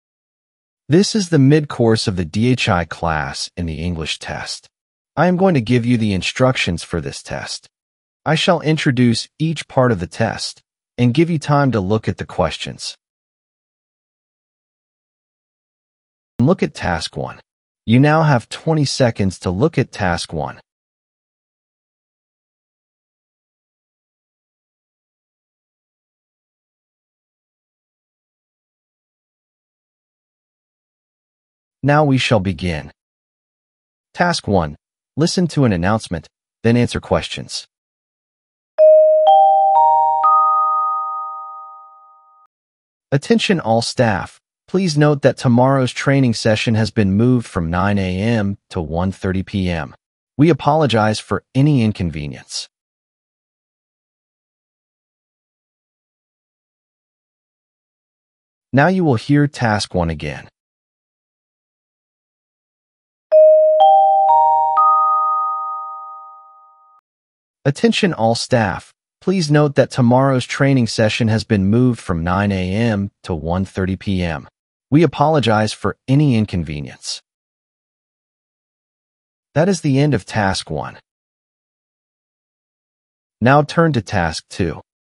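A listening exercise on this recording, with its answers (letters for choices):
Task 1: Listen to an announcement, then answer questions. (3 questions)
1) What is the announcement about?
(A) A change in training schedule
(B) A meeting cancellation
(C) A new training program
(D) A holiday notice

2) What is the new time for the training session?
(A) 10:00 a.m.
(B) 11:30 a.m.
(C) 1:30 p.m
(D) 3:00 p.m.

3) What type of communication is this?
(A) A complaint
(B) A reminder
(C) A request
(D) An announcement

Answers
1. A
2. C
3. D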